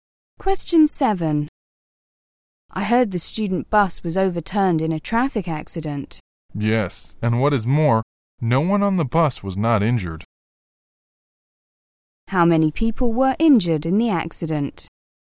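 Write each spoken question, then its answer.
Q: How many people were injured in the accident?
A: Everyone on the bus.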